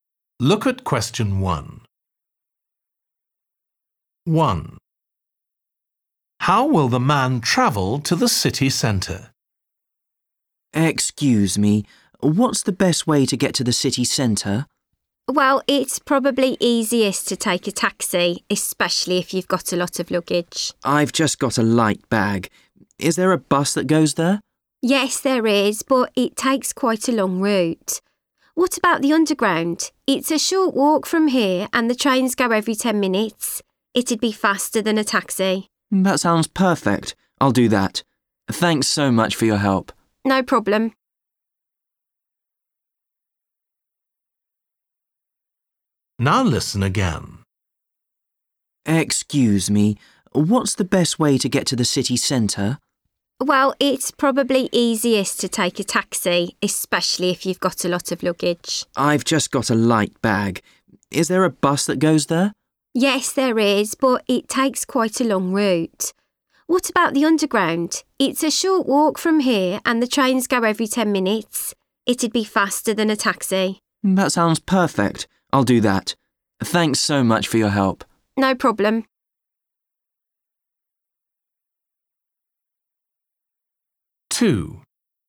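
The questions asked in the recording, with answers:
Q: How will the man travel to the city centre?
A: By underground (train)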